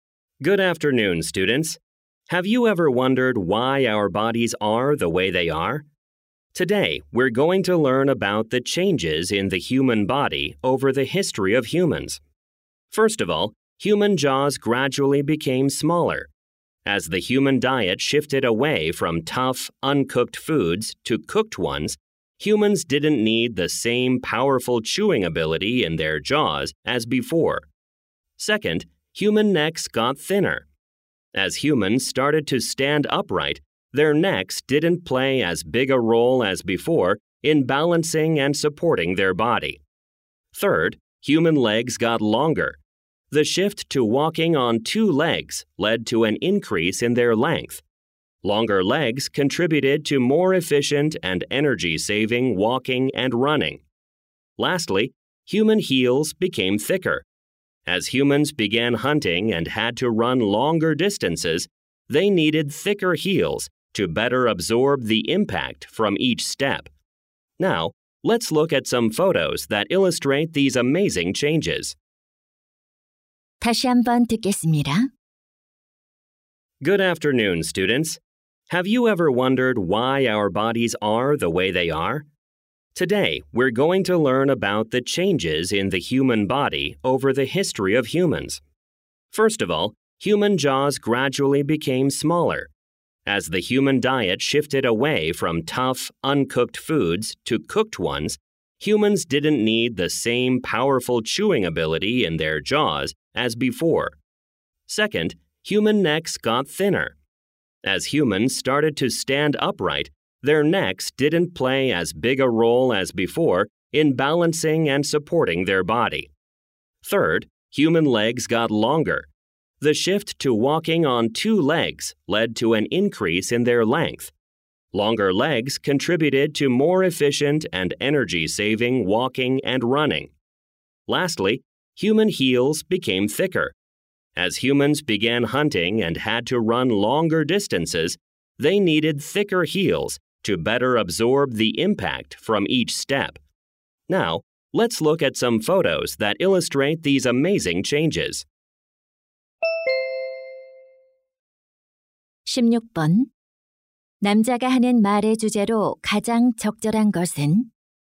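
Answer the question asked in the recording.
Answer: 인류 역사에 걸친 인간 신체의 변화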